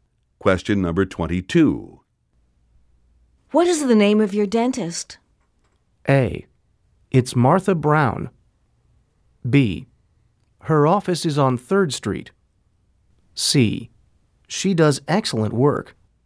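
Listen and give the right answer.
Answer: A: It's Martha Brown.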